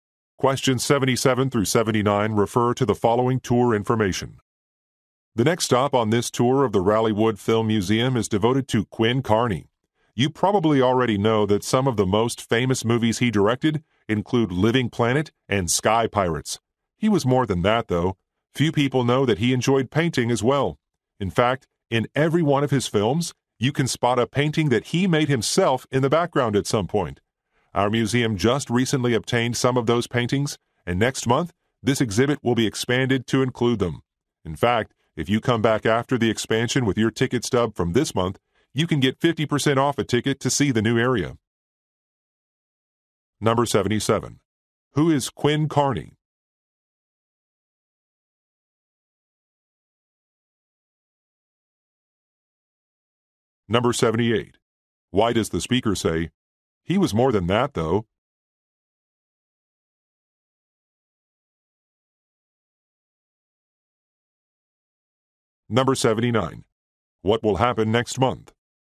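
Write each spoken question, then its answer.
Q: Who is Quinn Kearney?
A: A film director

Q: Why does the speaker say, "He was more than that, though"?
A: To point out he was also a painter

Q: What will happen next month?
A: The exhibit will be expanded to include his paintings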